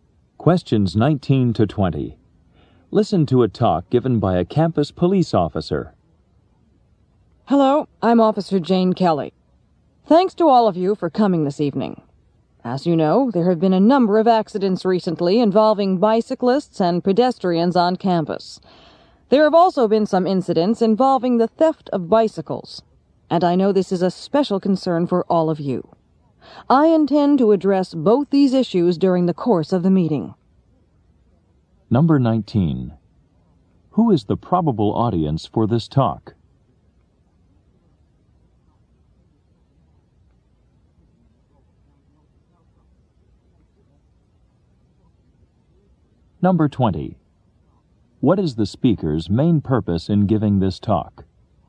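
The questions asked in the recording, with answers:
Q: What is the speaker's main purpose in giving this talk?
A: To discuss bicycle accidents and bicycle theft on campus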